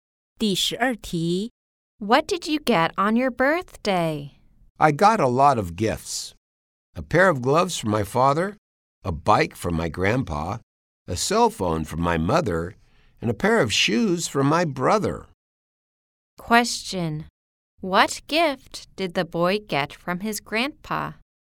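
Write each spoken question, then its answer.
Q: What gift did the boy get from his grandpa?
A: A bike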